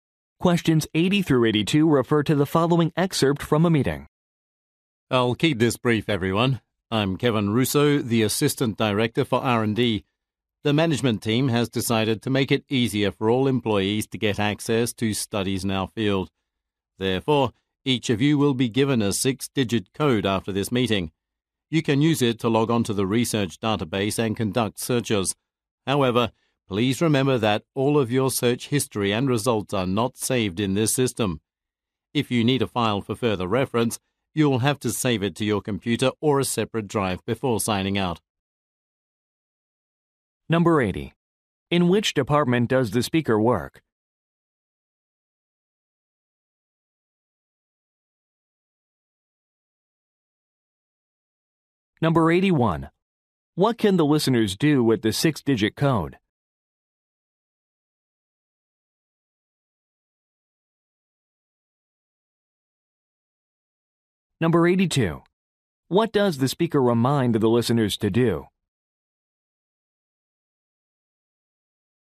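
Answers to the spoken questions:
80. Research and development
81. Log on to the research database
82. Save files before signing out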